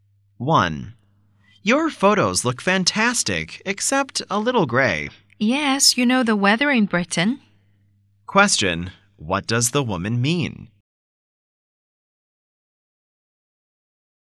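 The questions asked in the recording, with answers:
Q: Question, what does the woman mean?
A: The weather in Britain is often gray/cloudy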